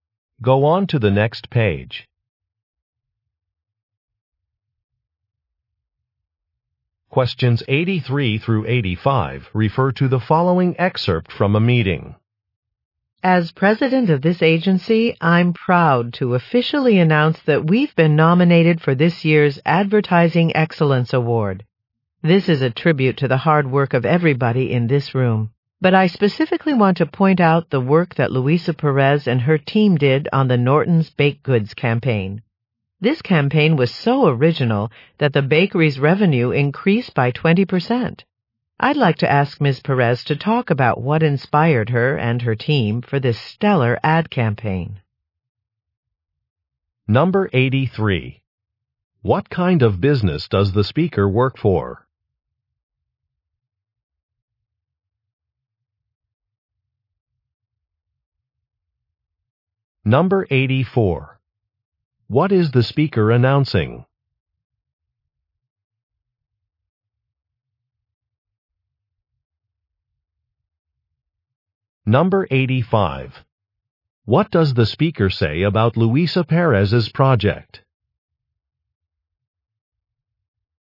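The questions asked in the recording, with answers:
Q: What kind of business does the speaker work for?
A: An advertising agency

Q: What is the speaker announcing?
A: A nomination for an award

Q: What does the speaker say about Luisa Perez's project?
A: It raised the bakery's revenue by 20%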